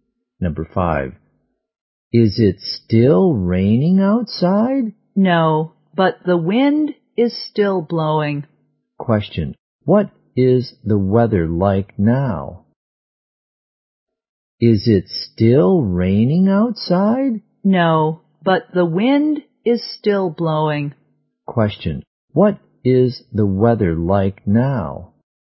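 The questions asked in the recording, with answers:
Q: What is the weather like now?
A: Windy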